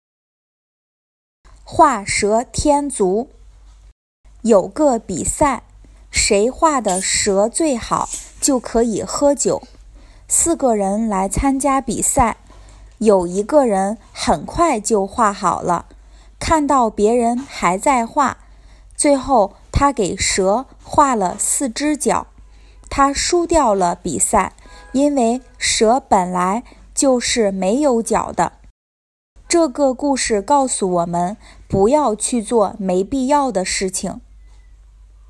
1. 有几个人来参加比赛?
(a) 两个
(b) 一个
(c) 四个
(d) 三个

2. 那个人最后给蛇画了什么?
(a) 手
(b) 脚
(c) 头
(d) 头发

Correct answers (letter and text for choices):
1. (c) 四个
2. (b) 脚

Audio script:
四个人来参加比赛。有一个人很快就画好了,看到别人还在画,最后他给蛇画了四只脚。他输掉了比赛,因为蛇本来就是没有脚的!
他输掉了比赛,因为蛇本来就是没有脚的! 这个故事告诉我们,不要去做没必要的事情。

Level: beginner